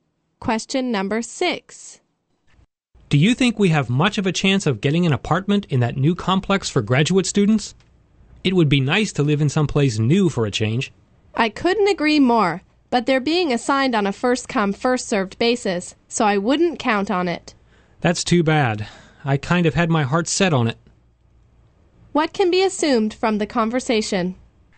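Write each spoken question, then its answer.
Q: What can be assumed from the conversation?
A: They probably won't get an apartment in the new complex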